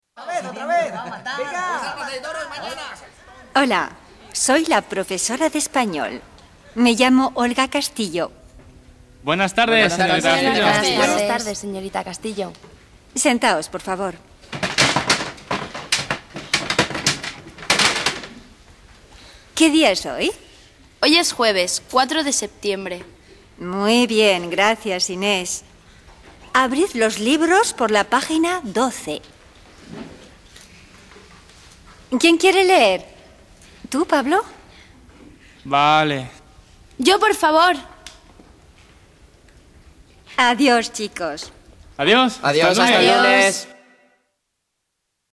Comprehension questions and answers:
Contesta a estas preguntas, contarás la escena con más detalles.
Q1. ¿Dónde pasa la escena?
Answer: La escena pasa en una clase de español.

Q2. ¿Qué voces oímos?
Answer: de los alumnos, de Pablo, de Inés y de la profesora

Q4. ¿Qué dicen los alumnos para saludar?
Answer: Buenas tardes

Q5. ¿Cómo se llama la profesora?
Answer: La profesora se llama Olga Castillo.

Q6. ¿Cuál es su apellido?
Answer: Su apellido es Castillo.

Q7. ¿Qué pregunta la profesora?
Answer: La profesora pregunta la fecha de hoy.

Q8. ¿Qué quiere la profesora?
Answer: La profesora quiere que los alumnos se sienten

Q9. ¿Qué palabra emplea Pablo para decir "de acuerdo"?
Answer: Pablo dice "vale".

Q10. ¿Qué dicen los alumnos para despedirse?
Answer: hasta el lunes

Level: 2ème année